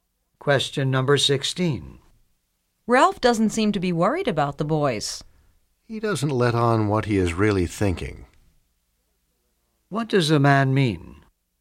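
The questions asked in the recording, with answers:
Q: What does a man mean?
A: Ralph hides what he is really thinking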